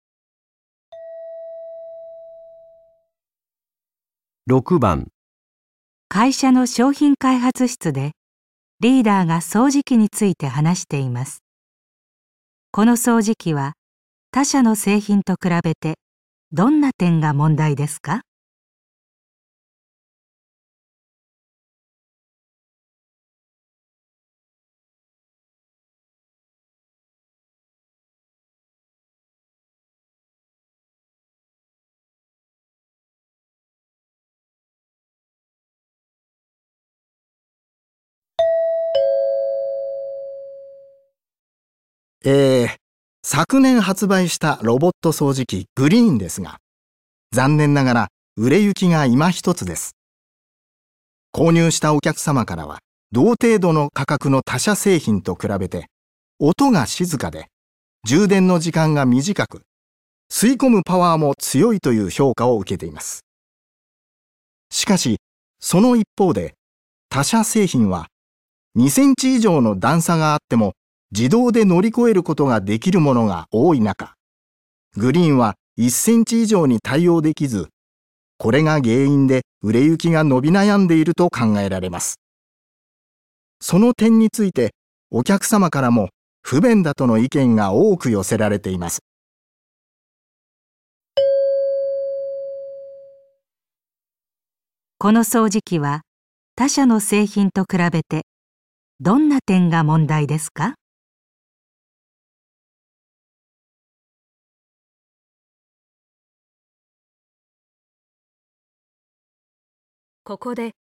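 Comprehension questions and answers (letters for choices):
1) この掃除機は他社の製品と比べて、どんな点が問題ですか。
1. 音がうるさい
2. じゅう電に時間がかかる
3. 吸い込むパワーが弱い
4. 対応できる段差が低い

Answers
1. 4

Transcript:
6、会社の商品開発室でリーダーが掃除機について話しています。この掃除機は他社の製品と比べて、どんな点が問題ですか。
昨年発売したロボット掃除機グリンですが、残念ながら売れ行きが今一つです。購入したお客様からは同程度の価格の他社製品と比べて、音が静かで、充電の時間が短く、吸い込むパワーも強いという評価を受けています。しかし、その一方で、他社製品は2センチ以上の段差があっても自動で乗り越えることができるものが多い中、グリンは1センチ以上に対応できず、これが原因で売れ行きが伸び悩んでいると考えられます。その点について お客様からも不便だとの意見が多く寄せられています。

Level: N2 第3回】聴解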